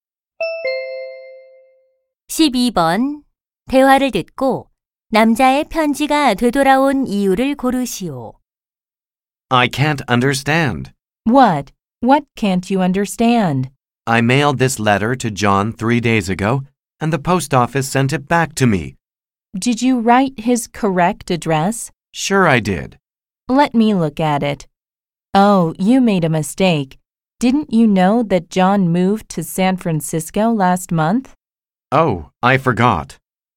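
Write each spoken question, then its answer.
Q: 대화를 듣고 남자의 편지가 되돌아온 이유를 고르시오.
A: John이 이사를 가서 주소가 틀림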